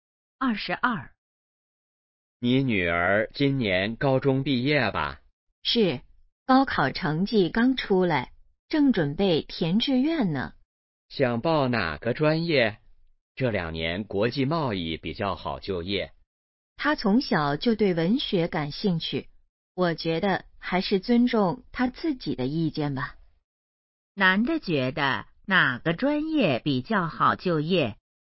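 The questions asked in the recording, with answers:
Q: 男的觉得哪个专业比较好就业?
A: 国际贸易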